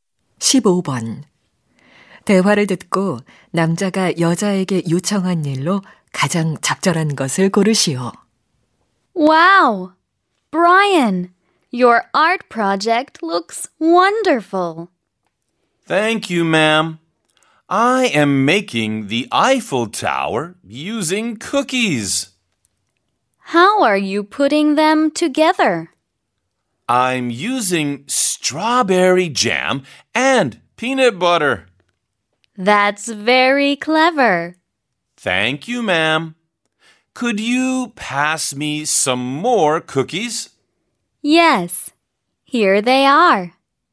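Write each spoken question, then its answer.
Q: 대화를 듣고 남자가 여자에게 요청한 일로 가장 적절한 것을 고르시오.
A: 쿠키를 더 건네주기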